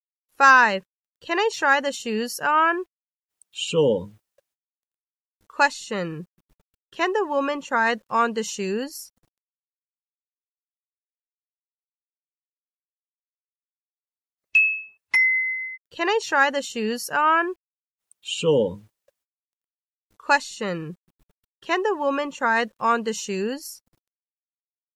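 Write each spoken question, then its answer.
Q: Can the woman try on the shoes?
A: Yes, she can.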